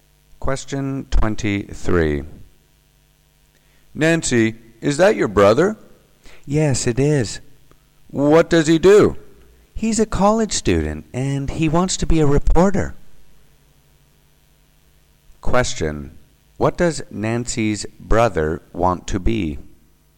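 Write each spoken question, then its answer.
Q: What does Nancy's brother want to be?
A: A reporter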